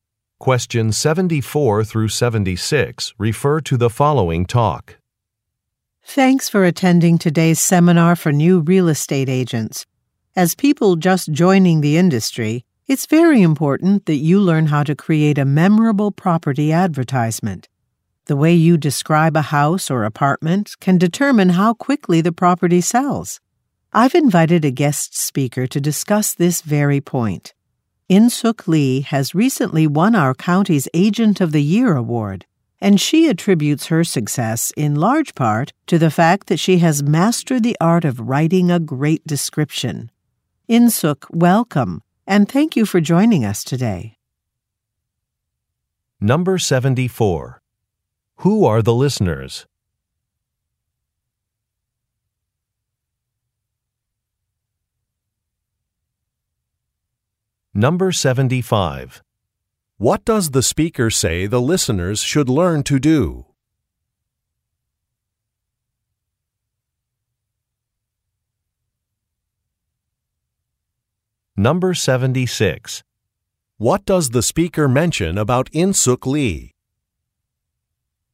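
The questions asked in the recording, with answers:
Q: Who are the listeners?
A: New real estate agents

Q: What does the speaker say the listeners should learn to do?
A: Create a memorable property advertisement

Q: What does the speaker mention about Insook Lee?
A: She recently won the county's Agent of the Year award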